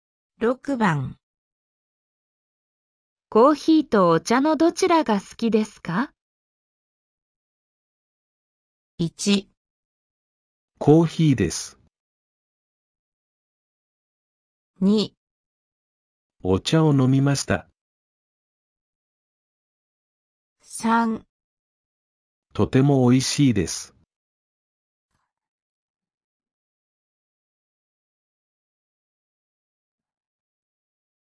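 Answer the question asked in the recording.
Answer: 1

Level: N5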